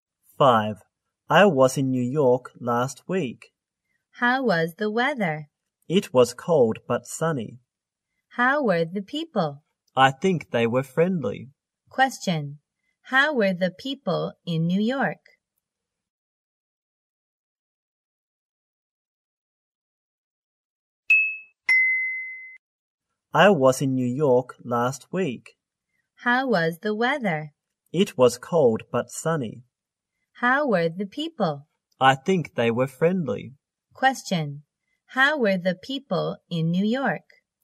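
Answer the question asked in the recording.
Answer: Friendly.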